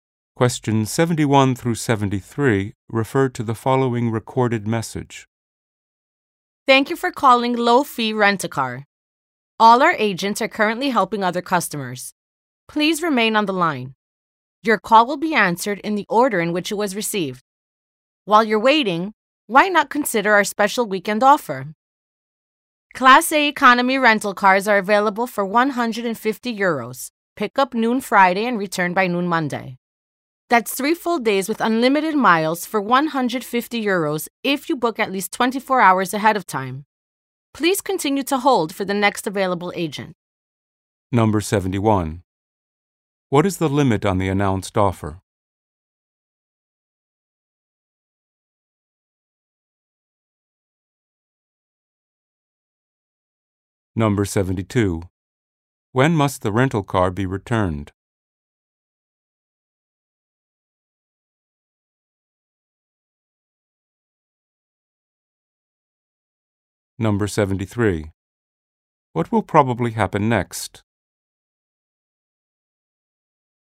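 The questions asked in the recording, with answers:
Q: What is the limit on the announced offer?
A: It must be booked at least 24 hours ahead

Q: When must the rental car be returned?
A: By noon Monday

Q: What will probably happen next?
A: An agent will answer the call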